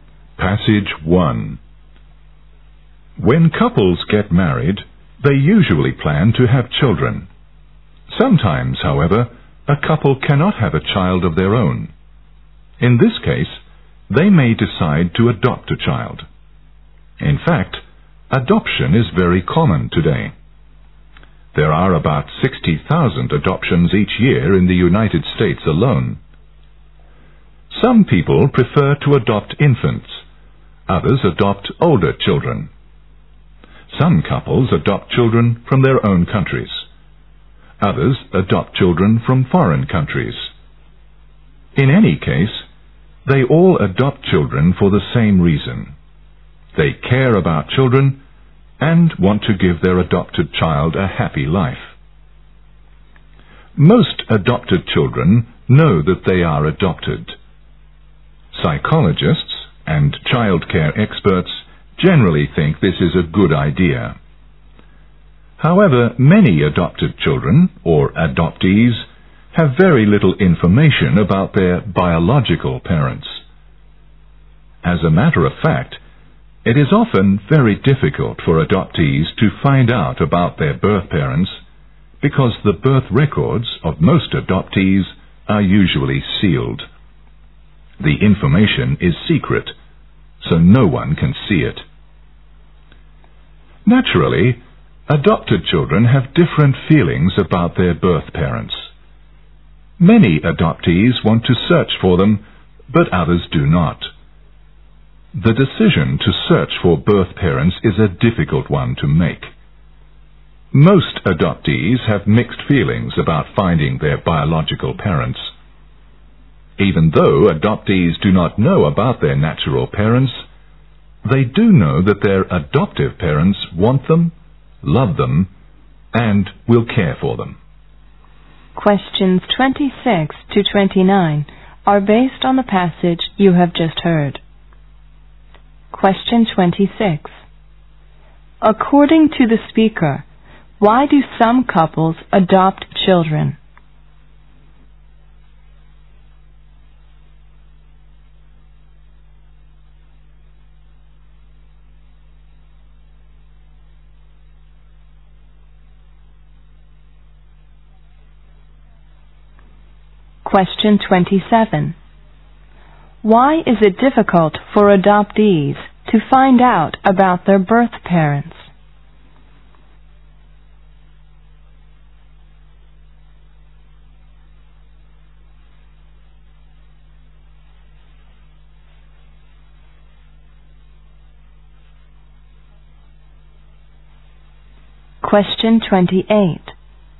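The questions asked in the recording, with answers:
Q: Why is it difficult for adoptees to find out about their birth parents?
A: Their birth records are usually sealed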